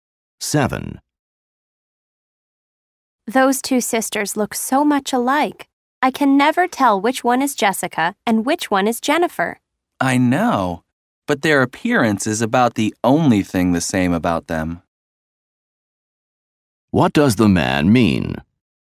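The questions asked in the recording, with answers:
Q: What does the man mean?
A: The sisters have very different personalities.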